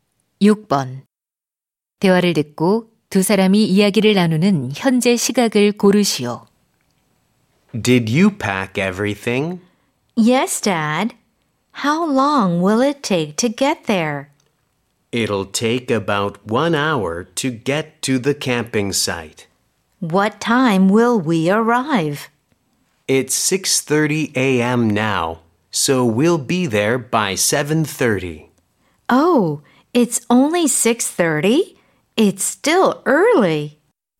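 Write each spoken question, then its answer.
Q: 대화를 듣고 두 사람이 이야기를 나누는 현재 시각을 고르시오.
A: 오전 6시 30분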